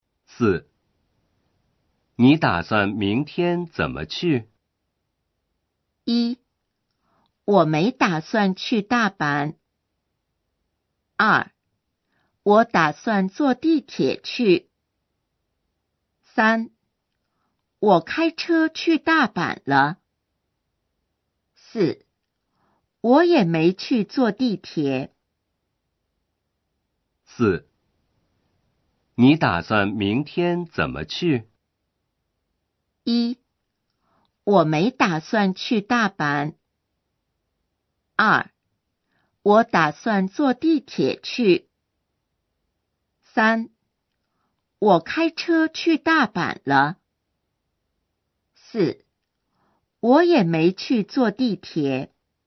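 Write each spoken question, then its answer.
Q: 你打算明天怎么去?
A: 2: 我打算坐地铁去。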